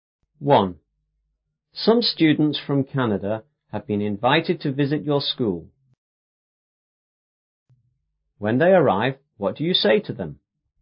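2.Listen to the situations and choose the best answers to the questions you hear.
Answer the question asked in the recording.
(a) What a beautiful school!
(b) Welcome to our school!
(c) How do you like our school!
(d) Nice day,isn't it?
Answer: (b) Welcome to our school!

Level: 初中英语广州版5B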